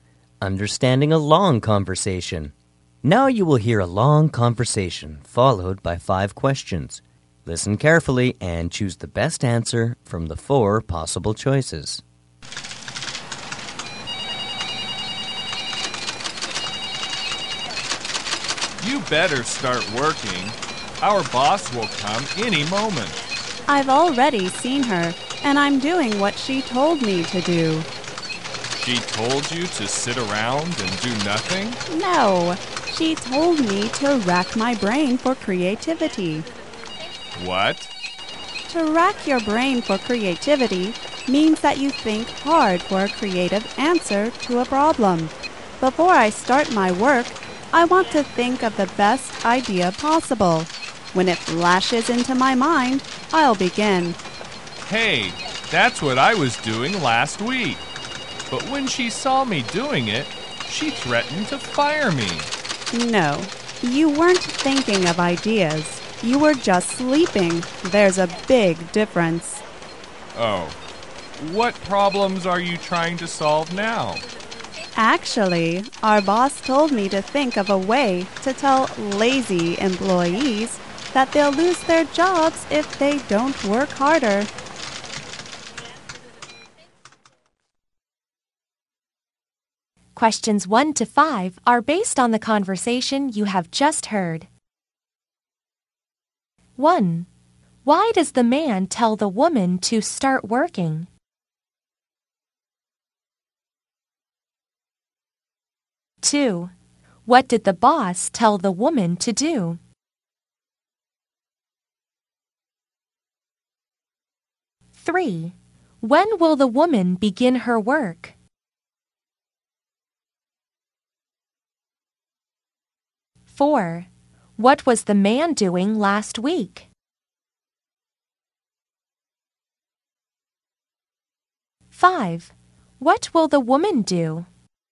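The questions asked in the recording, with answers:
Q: Why does the man tell the woman to start working?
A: Their boss will come any moment

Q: What did the boss tell the woman to do?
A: Rack her brain for creativity

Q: When will the woman begin her work?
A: When the best idea flashes into her mind

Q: What was the man doing last week?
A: Sleeping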